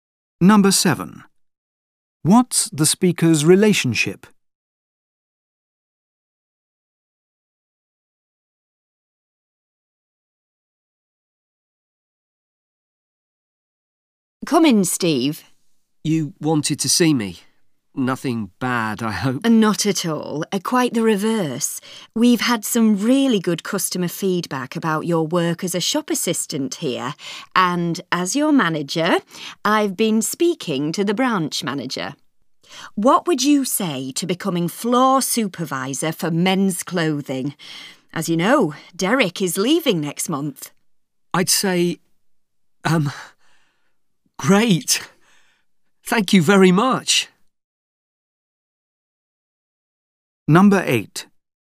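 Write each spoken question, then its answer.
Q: What's the speaker's relationship?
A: Manager and employee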